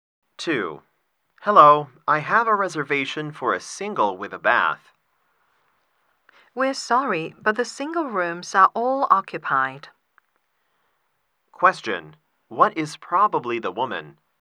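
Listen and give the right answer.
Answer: A hotel receptionist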